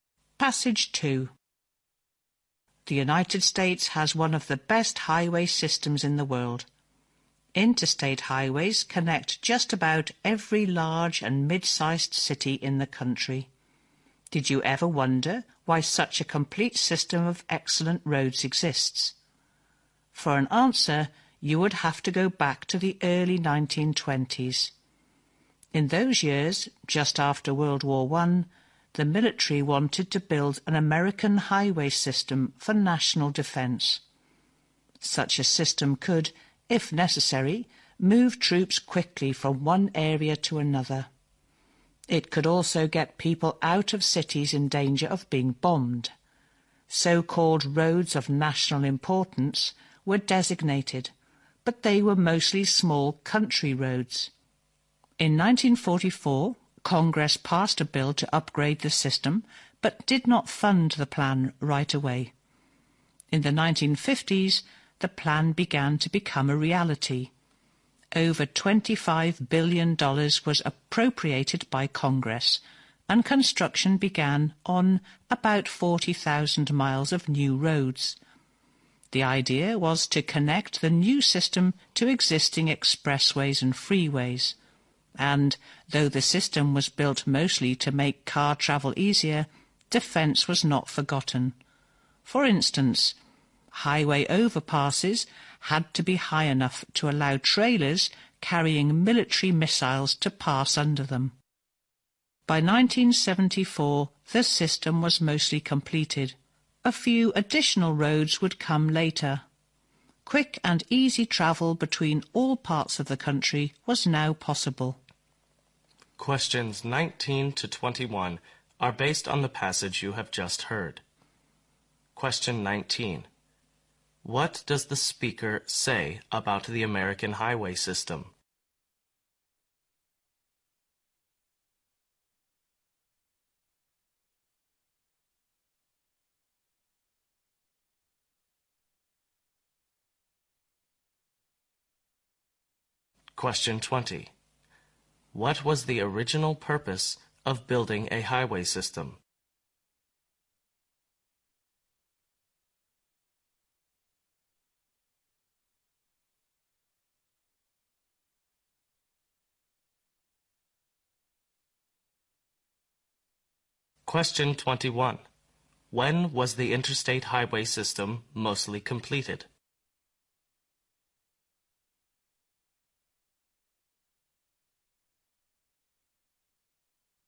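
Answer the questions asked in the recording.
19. It is one of the best in the world.
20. National defense.
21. By 1974.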